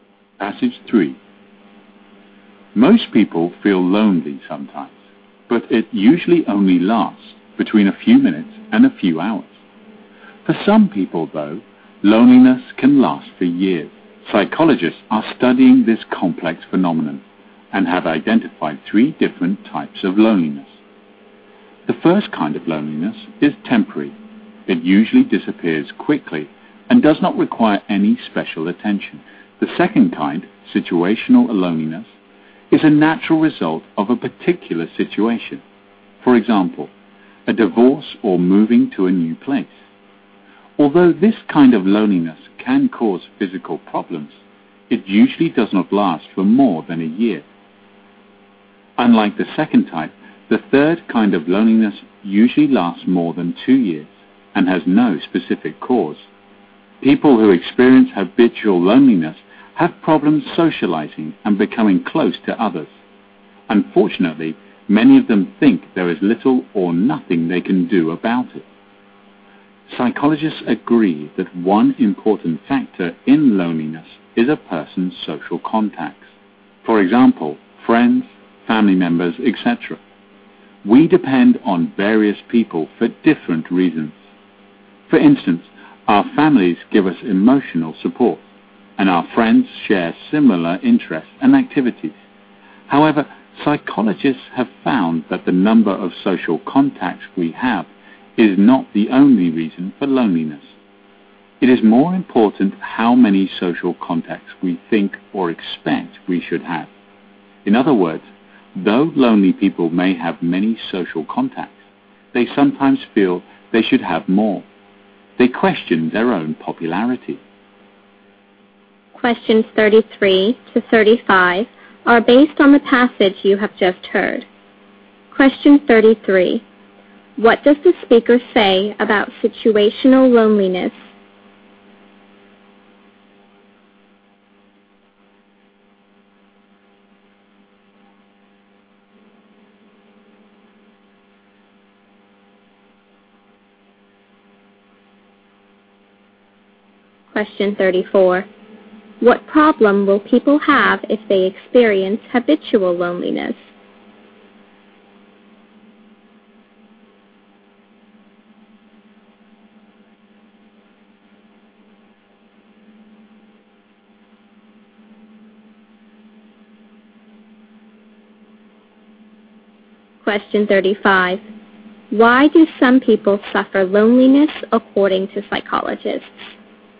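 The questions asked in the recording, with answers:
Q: What does the speaker say about situational loneliness?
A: It results from a particular situation and usually lasts no more than a year.

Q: What problem will people have if they experience habitual loneliness?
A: They have trouble socializing and becoming close to others.

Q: Why do some people suffer loneliness according to psychologists?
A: They think they should have more social contacts.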